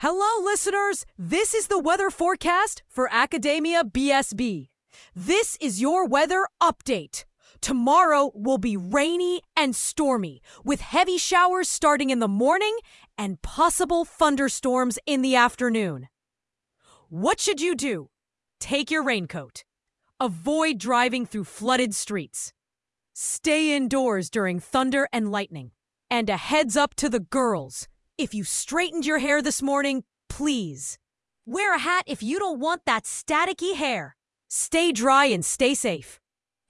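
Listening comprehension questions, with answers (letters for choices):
Listen to these audios and match them with the descriptions below:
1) Weather Announce 4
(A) ☀️ Blazing Hot Day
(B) 🌧️ Heavy Rain and Thunderstorms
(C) 🌨️ Snowstorm Alert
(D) 🌬️ Windy and Dusty Conditions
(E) 🌫️ Cold and Foggy Morning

Listen and fill in the blanks.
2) Hello listeners! This is the Weather Forecast for Academia BSB. This is your weather __________!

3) Tomorrow will be rainy and stormy, with heavy __________ starting in the morning and possible thunderstorms in the __________.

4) Avoid driving through __________ streets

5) And a heads-up to the girls:"If you straightened your hair this morning, please, __________ a hat if you don't what that staticky hair!"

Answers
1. B
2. update
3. showers; afternoon
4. flooded
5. wear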